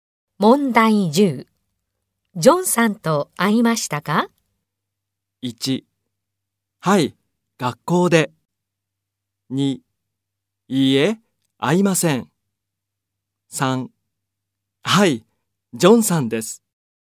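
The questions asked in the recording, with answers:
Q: ジョンさんと会いましたか?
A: 1: はい、学校で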